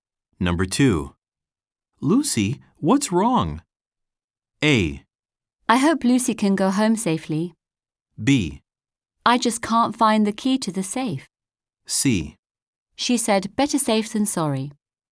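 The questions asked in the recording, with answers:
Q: Lucy, what's wrong?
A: B: I just can't find the key to the safe.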